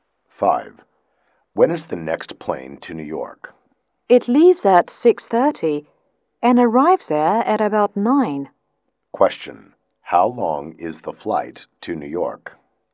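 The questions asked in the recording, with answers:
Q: How long is the flight to New York?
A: About two and a half hours.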